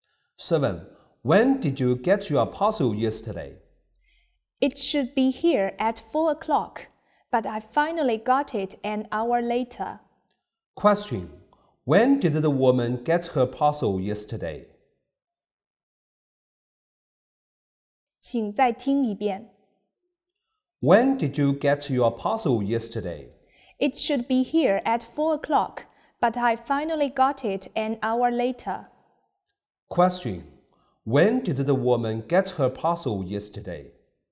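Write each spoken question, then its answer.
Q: When did the woman get her parcel yesterday?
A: At 5 o'clock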